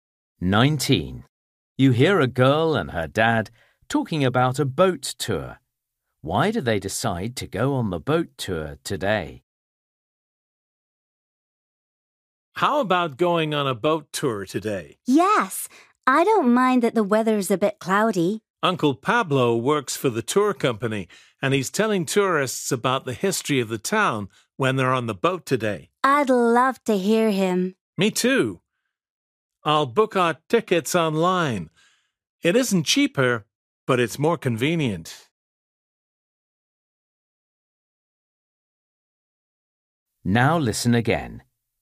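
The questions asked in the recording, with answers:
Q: Why do they decide to go on the boat tour today?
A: Because Uncle Pablo is telling tourists about the town's history on the boat today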